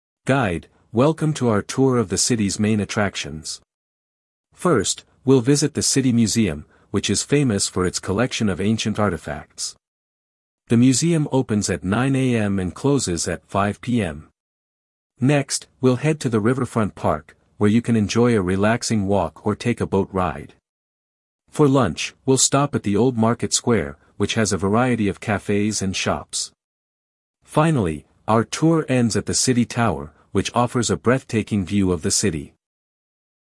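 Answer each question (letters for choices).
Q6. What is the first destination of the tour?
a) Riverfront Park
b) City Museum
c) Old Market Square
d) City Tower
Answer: b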